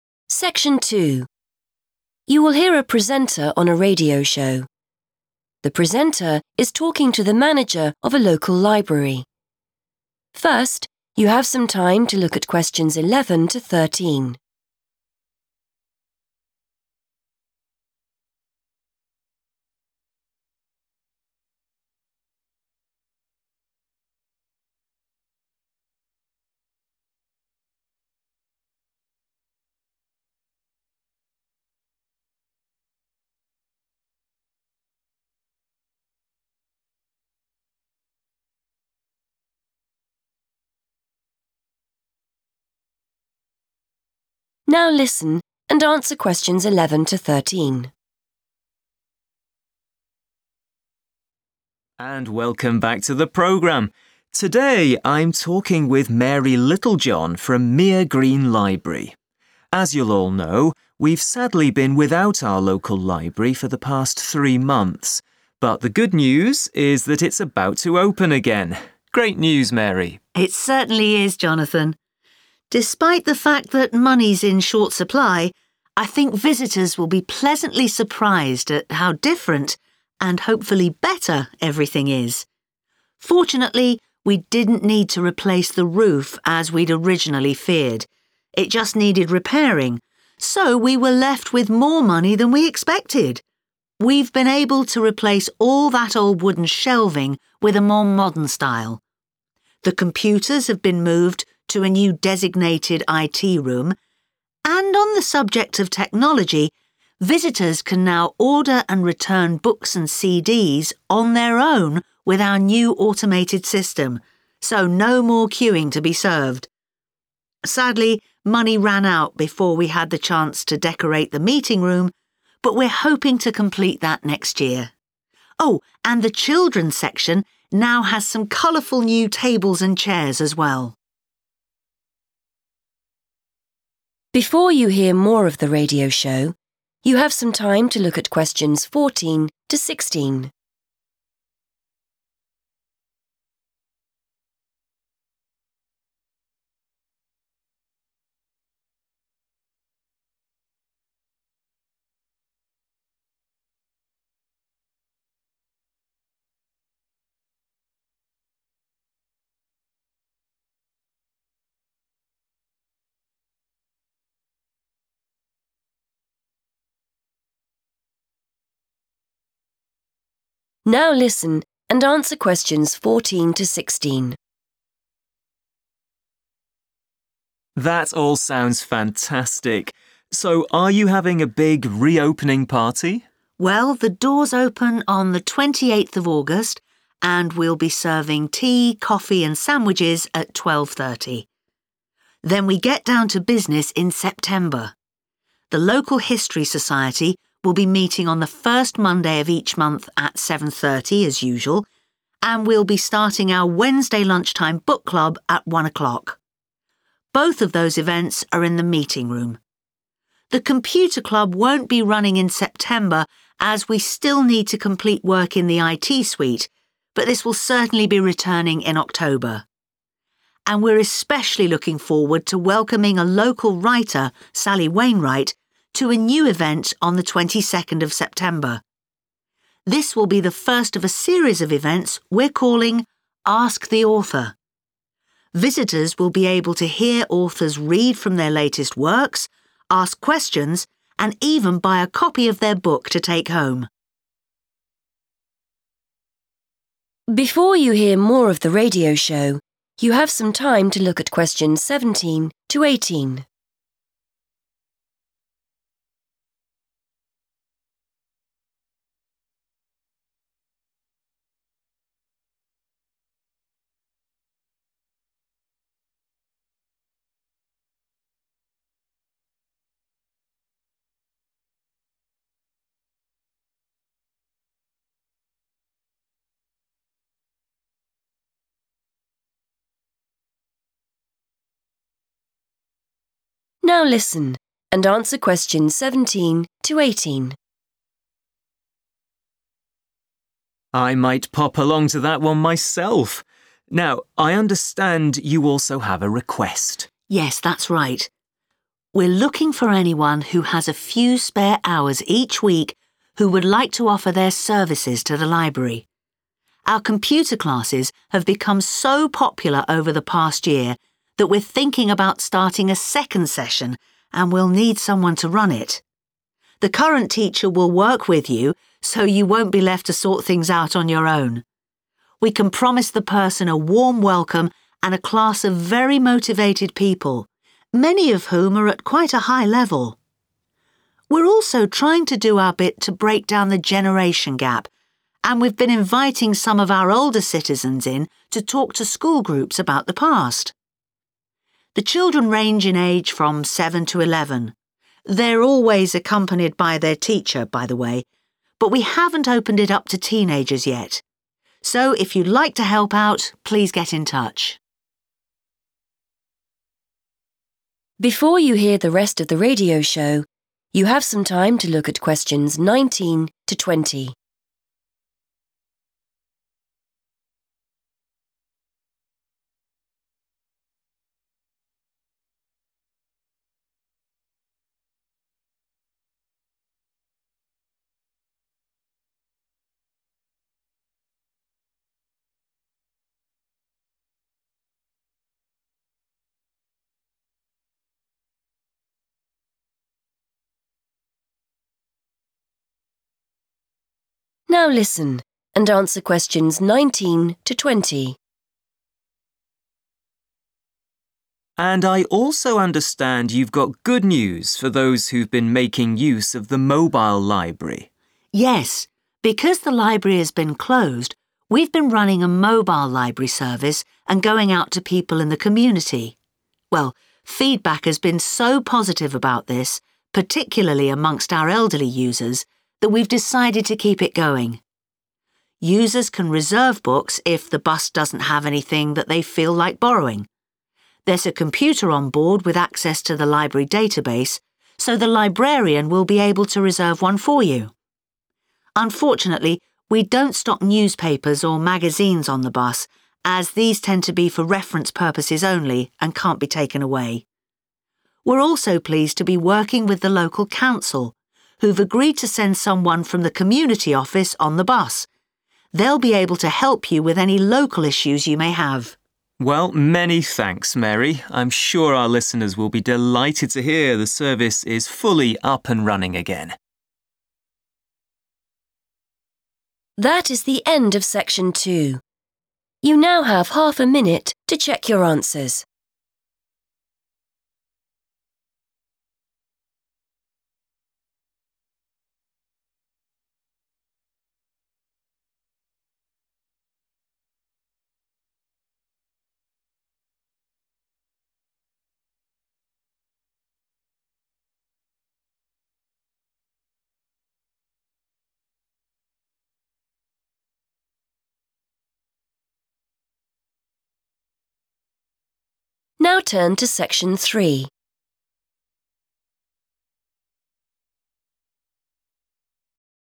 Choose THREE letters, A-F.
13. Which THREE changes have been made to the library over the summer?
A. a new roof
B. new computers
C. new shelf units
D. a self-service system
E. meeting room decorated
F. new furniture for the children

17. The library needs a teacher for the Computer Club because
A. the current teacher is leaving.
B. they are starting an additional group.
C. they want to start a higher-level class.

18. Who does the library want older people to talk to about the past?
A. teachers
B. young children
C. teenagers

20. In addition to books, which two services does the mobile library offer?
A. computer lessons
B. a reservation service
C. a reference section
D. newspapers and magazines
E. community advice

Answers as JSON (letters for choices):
{"13": "C", "17": "B", "18": "B", "20": "B"}

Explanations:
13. The correct answer is C, D, and F because the speaker lists these specific changes. For choice C, she mentions replacing old wood "shelving" with a "modern style." For choice D, she describes a "new automated system" where visitors can borrow books "on their own," which is a self-service system. For choice F, she states the children's part of the library has "new tables and chairs," which are pieces of furniture. Other options are incorrect because the roof was only "repairing" (not replaced), the computers were just "moved" to a different room (not described as new), and the meeting room was not "decorate[d]" because they didn't have enough money.
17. The correct answer is B because the transcript mentions that the computer classes are very popular and that many people attend them. Because of this high interest, the library plans to start a "second session," which is a synonym for an additional group or class. They need a new person to teach this new group alongside the current teacher. The current teacher is not leaving, so option A is wrong. Also, while some students are already at a high level, the main reason for needing a teacher is to manage the new, extra class group, making option C less accurate than B.
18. The correct answer is 'young children' because the speaker explains that older citizens are invited to talk to 'school groups' about the past. She defines these groups by saying the students are between seven and eleven years old. In English-speaking schools, children in this age range are considered young children or primary school students. The speaker also specifically mentions that they have not started working with 'teenagers' yet, which makes that choice incorrect.
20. The correct answer is B and E because Mary talks about two extra things the library bus does besides carrying books. First, she says users can 'reserve' a book using a computer database if it is not currently on the bus. This is a reservation service. Second, she says someone from the 'community office' will be on the bus to help with 'local issues,' which is the same as providing community advice.

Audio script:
and welcome back to the programme. Today I'm talking with Mary Littlejohn from Meere Green Library. As you'll all know, we've sadly been without our local library for the past three months but the good news is that it's about to open again. Great news, Mary.
Mary: It certainly is, Jonathan. Despite the fact that money's in short supply, I think visitors will be pleasantly surprised at how different - and hopefully better - everything is. Fortunately, we didn't need to replace the roof as we'd originally feared. It just needed repairing, so we were left with more money than we expected. We've been able to replace all that old wooden shelving with a more modern style. The computers have been moved to a new designated IT room, and on the subject of technology, visitors can now order and return books and CDs on their own with our new automated system - so no more queuing to be served. Sadly, money ran out before we had the chance to decorate the meeting room but we're hoping to complete that next year. Oh, and the children's section now has some colourful new tables and chairs as well.
Presenter: That all sounds fantastic. So, are you having a big re-opening party?
Mary: Well, the doors open on 28th August and we'll be serving tea, coffee and sandwiches at 12.30. Then we get down to business in September. The local History Society will be meeting on the first Monday of each month at 7.30 as usual, and we'll be starting our Wednesday lunchtime Book Club at 1.00. Both of those events are in the meeting room. The Computer Club won't be running in September as we still need to complete work in the IT suite, but this will certainly be returning in October. And we're especially looking forward to welcoming a local writer, Sally Wainright, to a new event on 22nd September. This will be the first of a series of events we're calling 'Ask the Author'. Visitors will be able to hear authors read from their latest works, ask questions and even buy a copy of their book to take home.
Presenter: I might pop along to that one myself. Now, I understand you also have a request.
Mary: Yes, that's right. We're looking for anyone who has a few spare hours each week who would like to offer their services to the library. Our computer classes have become so popular over the past year that we're thinking about starting a second session and we'll need someone to run it. The current teacher will work with you, so you won't be left to sort things out on your own. We can promise the person a warm welcome and a class of very motivated people, many of whom are at quite a high level. We're also trying to do our bit to break down the generation gap and we've been inviting some of our older citizens in to talk to school groups about the past. The children range in age from seven to eleven - they're always accompanied by their teacher, by the way - but we haven't opened it up to teenagers yet. So, if you'd like to help out, please get in touch.
Presenter: And I also understand you've got good news for those who've been making use of the mobile library.
Mary: Yes. Because the library has been closed, we've been running a mobile library service and going out to people in the community. Well, feedback has been so positive about this, particularly amongst our elderly users, that we've decided to keep it going. Users can reserve books if the bus doesn't have anything that they feel like borrowing. There's a computer on board with access to the library database, so the librarian will be able to reserve one for you. Unfortunately, we don't stock newspapers or magazines on the bus as these tend to be for reference purposes only and can't be taken away. We're also pleased to be working with the local council, who've agreed to send someone from the community office on the bus. They'll be able to help you with any local issues you may have.
Presenter: Well, many thanks, Mary. I'm sure our listeners will be delighted to hear the service is fully up and running again.